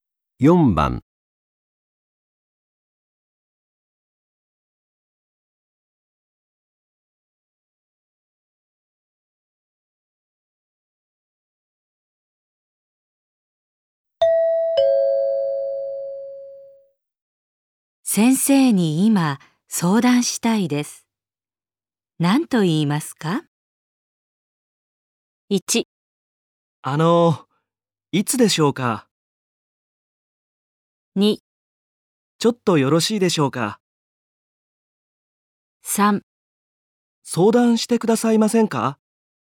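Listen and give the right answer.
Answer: 2: ちょっとよろしいでしょうか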